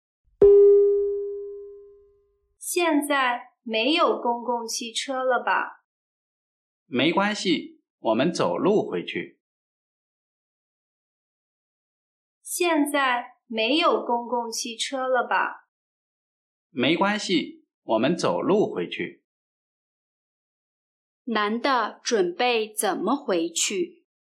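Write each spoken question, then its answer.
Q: 男的准备怎么回去?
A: 走路回去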